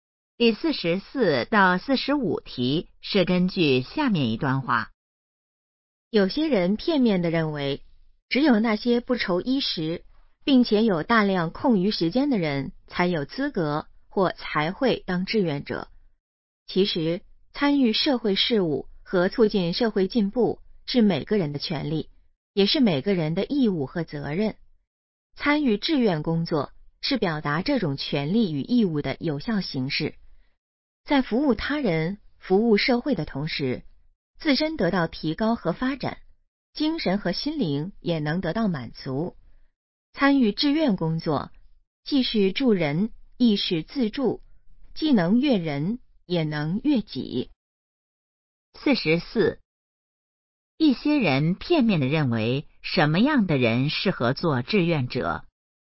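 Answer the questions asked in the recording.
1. 不愁衣食并有大量空余时间的人
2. 既能助人也能自助,自身得到提高,精神得到满足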